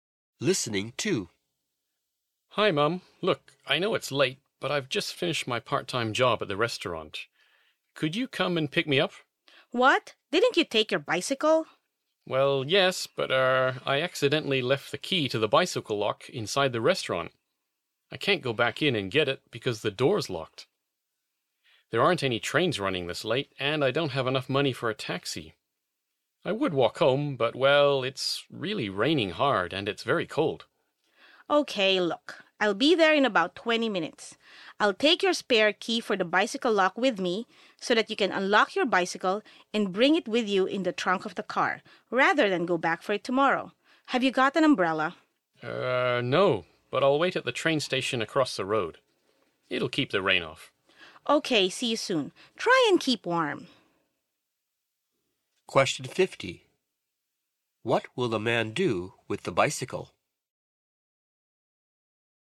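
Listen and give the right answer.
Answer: Unlock it with the spare key and bring it home in the car's trunk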